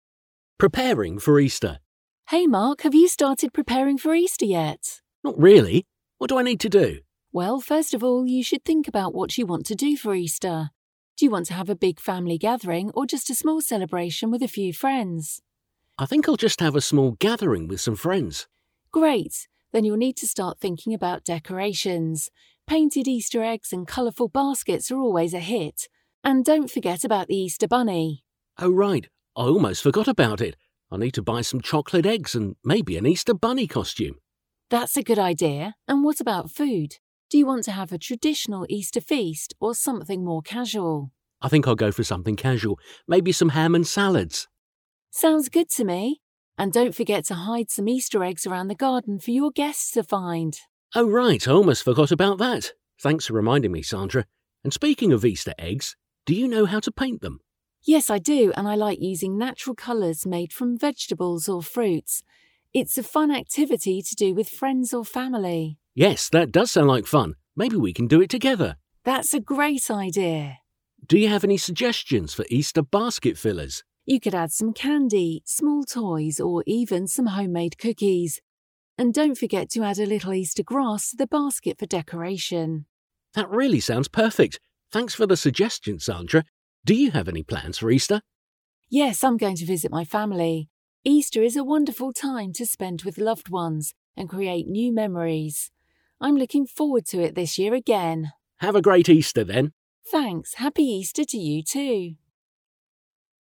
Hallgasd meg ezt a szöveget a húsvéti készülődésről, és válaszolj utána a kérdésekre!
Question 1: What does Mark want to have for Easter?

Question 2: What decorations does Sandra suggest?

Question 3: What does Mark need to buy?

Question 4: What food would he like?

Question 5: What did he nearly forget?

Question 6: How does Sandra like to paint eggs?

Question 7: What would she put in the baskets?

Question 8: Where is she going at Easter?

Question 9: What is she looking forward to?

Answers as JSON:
{"1": "A small celebration (gathering) with friends.", "2": "Painted eggs and colourful baskets.", "3": "Chocolate eggs and a bunny costume.", "4": "Ham and some salads.", "5": "To hide (Easter) eggs around the garden for the guests.", "6": "With natural colours made from vegetables and fruits.", "7": "Candy, small toys, (homemade) cookies and some grass.", "8": "To visit her family.", "9": "To spend time with loved ones and create new memories."}

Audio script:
Preparing for Easter
Sandra: Hey Mark, have you started preparing for Easter yet?
Mark: Not really, what do I need to do?
S: Well, first of all, you should think about what you want to do for Easter. Do you want to have a big family gathering or just a small celebration with a few friends?
M: I think I'll just have a small gathering with some friends.
S: Great, then you'll need to start thinking about decorations. Painted Easter eggs and colourful baskets are always a hit. And don't forget about the Easter bunny!
M: Oh right, I almost forgot about it. I'll need to buy some chocolate eggs and maybe an Easter bunny costume.
S: That's a good idea. And what about food? Do you want to have a traditional Easter feast or something more casual?
M: I think I'll go for something casual. Maybe some ham and salads.
S: Sounds good to me. And don't forget to hide some Easter eggs around the garden for your guests to find!
M: Oh, right. Thanks for reminding me, Sandra. And speaking of Easter eggs, do you know how to paint them?
S: Yes, I do and I like using natural colours made from vegetables or fruits. It's a fun activity to do with friends or family.
M: Yes, that does sound like fun. Maybe we can do it together.
S: That's a great idea.
M: Do you have any suggestions for Easter basket fillers?
S: You could add some candy, small toys, or even some homemade cookies. And don't forget to add a little Easter grass to the basket for decoration.
M: That really sounds perfect. Thanks for the suggestions, Sandra. Do you have any plans for Easter?
S: Yes, I'm going to visit my family. Easter is a wonderful time to spend with loved ones and create new memories. I'm looking forward to it this year again.
M: Have a great Easter, then!
S: Thanks, happy Easter to you too!

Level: B1